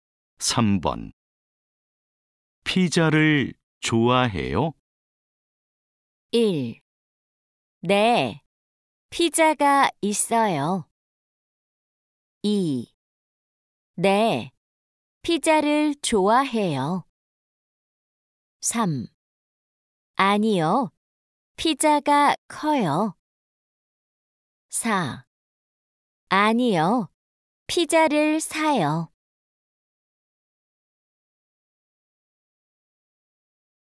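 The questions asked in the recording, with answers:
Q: 피자를 좋아해요?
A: 2: 네, 피자를 좋아해요.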